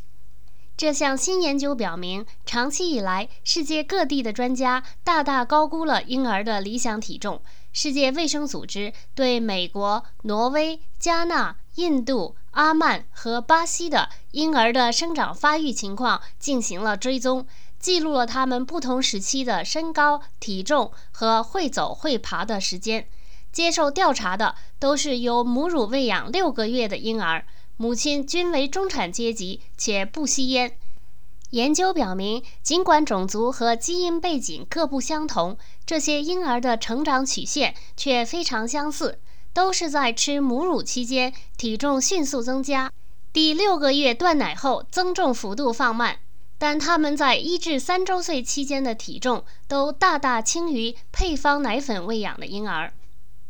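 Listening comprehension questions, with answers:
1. 根据世界卫生组织的研究,什么样儿童的体重比目前实行的体重标准低?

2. 儿童在多大时体重增长放慢?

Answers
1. 母乳喂养的儿童
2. 六个月断奶后

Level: 3rd Year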